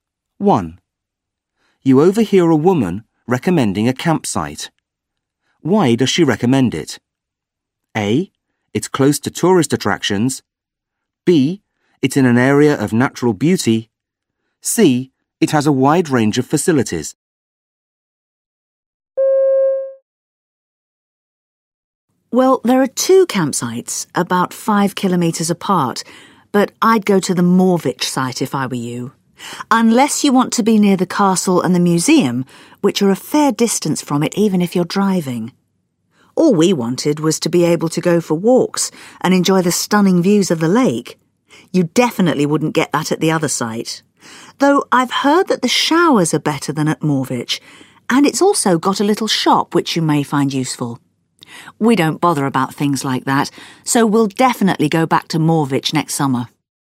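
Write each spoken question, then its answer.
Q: Why does she recommend it?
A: B: It's in an area of natural beauty.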